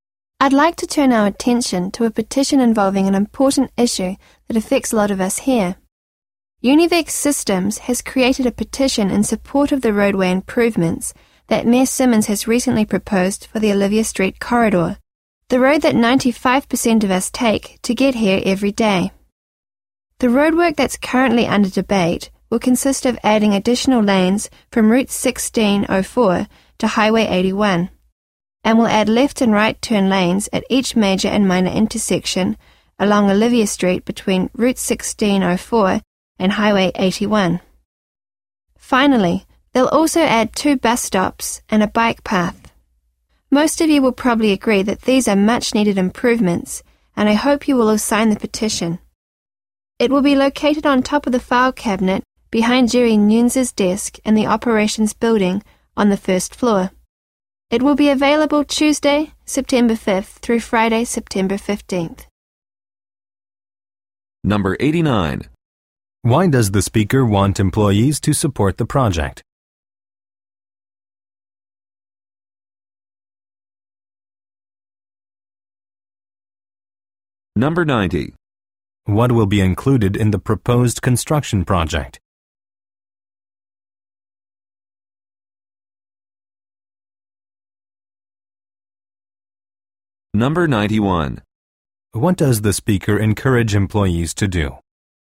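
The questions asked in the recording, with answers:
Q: Why does the speaker want employees to support the project?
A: Most of them use Olivia Street to get to work every day

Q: What will be included in the proposed construction project?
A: Additional lanes, turn lanes, two bus stops and a bike path

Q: What does the speaker encourage employees to do?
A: Sign the petition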